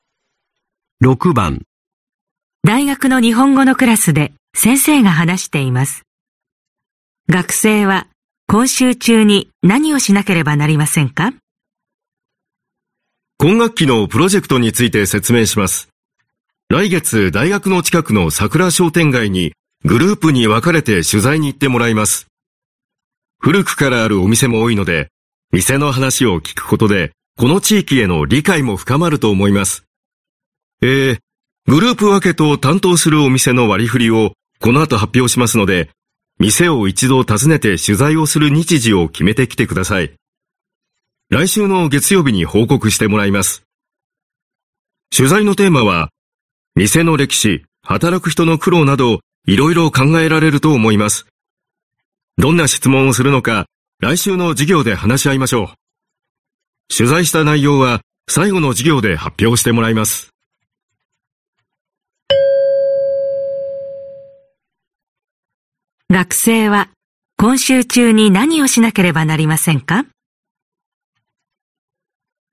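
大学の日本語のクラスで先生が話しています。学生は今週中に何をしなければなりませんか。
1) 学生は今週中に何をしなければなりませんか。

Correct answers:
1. 担当する店を一度訪ねて、取材をする日時を決める

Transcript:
男:今学期のプロジェクトについて説明します。来月大学の近くの桜商店街に、グループに分かれて取材に行ってもらいます。古くからあるお店も多いので、店の話を聞くことで、この地域への理解も深まると思います。ええ、グループ分けと担当するお店の割り振りを、このあと発表しますので、店を一度訪ねて取材をする日時を決めてきてください。来週の月曜日に報告してもらいます。取材のテーマは、店の歴史、働く人の苦労など、いろいろ考えられると思います。どんな質問をするのか、来週の授業で話し合いましょう。取材した内容は最後の授業で発表してもらいます。

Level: N1级别听力题库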